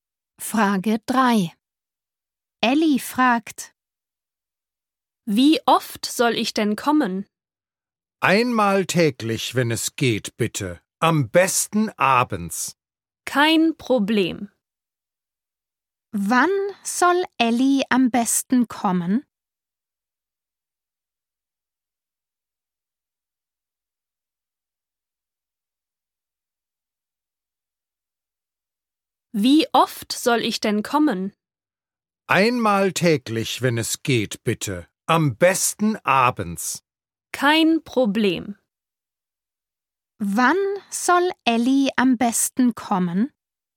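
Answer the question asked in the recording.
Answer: abends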